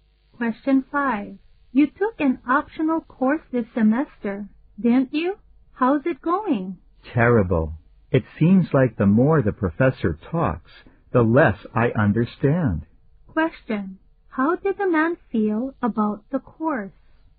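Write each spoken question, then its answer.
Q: How did the man feel about the course?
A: He found it hard to understand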